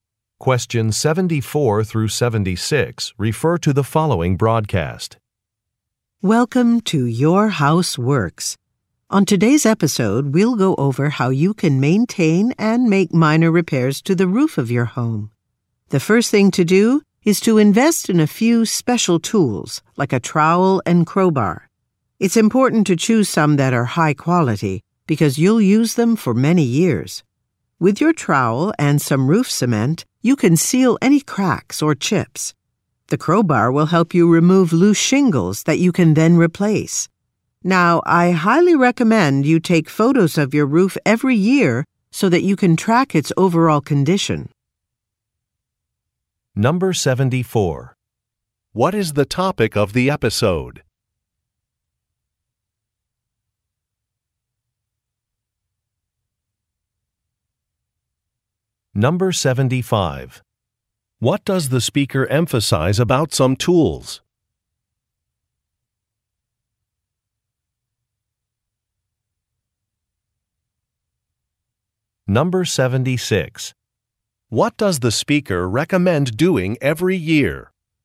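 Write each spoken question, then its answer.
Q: What is the topic of the episode?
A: Maintaining and repairing a roof

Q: What does the speaker emphasize about some tools?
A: They should be high quality

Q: What does the speaker recommend doing every year?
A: Taking photos of the roof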